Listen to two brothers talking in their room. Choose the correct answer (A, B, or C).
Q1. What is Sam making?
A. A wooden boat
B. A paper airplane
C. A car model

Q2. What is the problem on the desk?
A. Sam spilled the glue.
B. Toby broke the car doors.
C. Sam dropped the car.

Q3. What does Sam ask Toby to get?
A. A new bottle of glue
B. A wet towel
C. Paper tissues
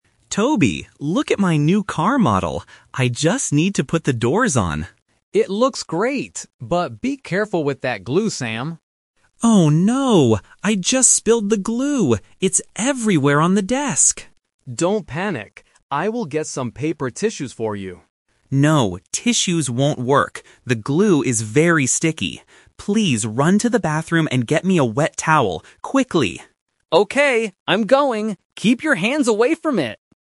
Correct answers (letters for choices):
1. C
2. A
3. B

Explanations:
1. Sam says excitedly at the beginning: "Toby, look at my new car model!"
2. Sam panics and says: "Oh no! I just spilled the glue! It's everywhere on the desk!"
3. Sam tells Toby what he needs: "...get me a wet towel! Quickly!"

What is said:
Sam: Toby, look at my new car model! I just need to put the doors on.
Toby: It looks great! But be careful with that glue, Sam.
Sam: Oh no! I just spilled the glue! It's everywhere on the desk!
Toby: Don't panic. I will get some paper tissues for you.
Sam: No, tissues won't work. The glue is very sticky. Please run to the bathroom and get me a wet towel! Quickly!